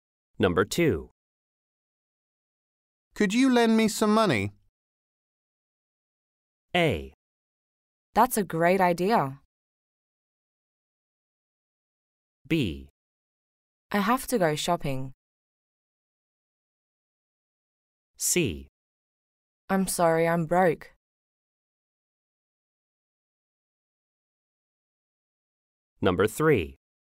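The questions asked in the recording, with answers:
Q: Could you lend me some money?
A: C: I'm sorry, I'm broke.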